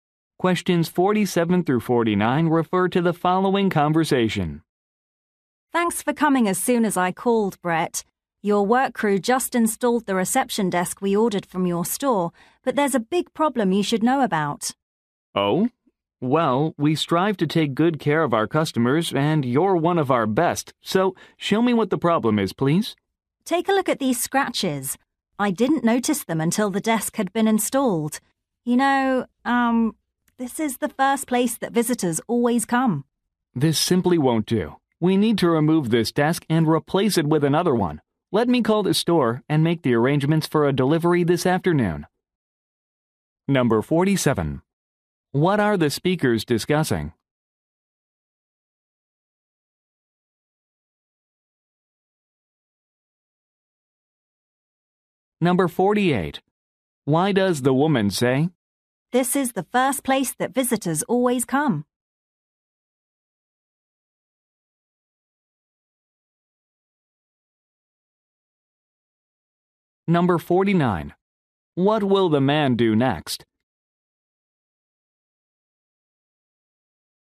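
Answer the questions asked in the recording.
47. A scratched reception desk
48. The desk must look good for visitors, so it must be replaced
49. Call the store to arrange a delivery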